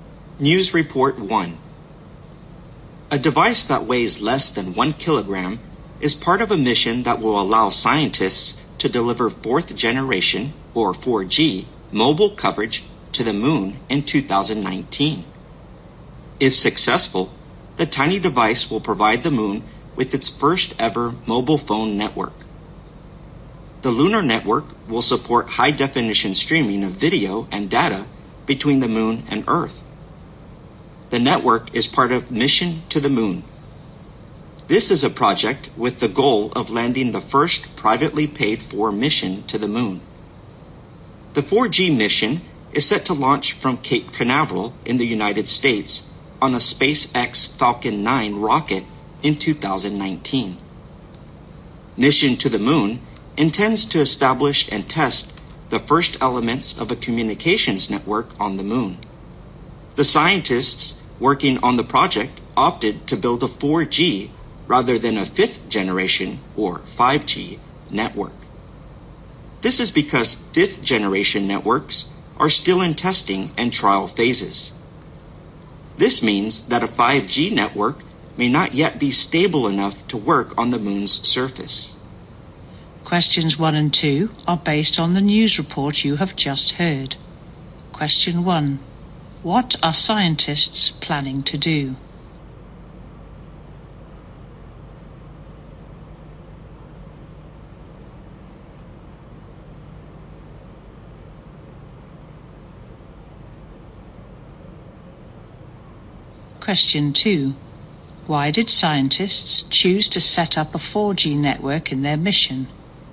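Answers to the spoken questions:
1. Set up a 4G mobile network on the moon in 2019
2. 5G networks are still being tested and may not be stable enough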